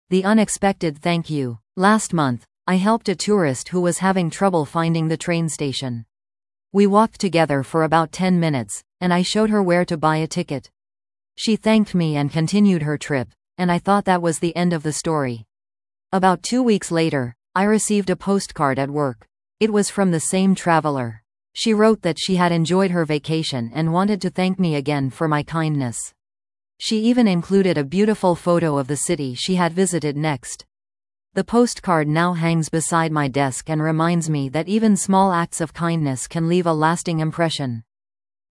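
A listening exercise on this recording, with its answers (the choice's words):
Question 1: Who did the speaker help?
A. A coworker.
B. A tourist.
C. A neighbor.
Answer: A tourist.

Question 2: What arrived two weeks later?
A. A package.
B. A postcard.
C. An email.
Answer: A postcard.

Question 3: Where does the speaker keep the postcard?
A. In a wallet.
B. Beside the desk.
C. In a photo album.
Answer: Beside the desk.

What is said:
The Unexpected Thank-You
Last month, I helped a tourist who was having trouble finding the train station. We walked together for about ten minutes, and I showed her where to buy a ticket. She thanked me and continued her trip, and I thought that was the end of the story. About two weeks later, I received a postcard at work. It was from the same traveler. She wrote that she had enjoyed her vacation and wanted to thank me again for my kindness. She even included a beautiful photo of the city she had visited next. 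The postcard now hangs beside my desk and reminds me that even small acts of kindness can leave a lasting impression.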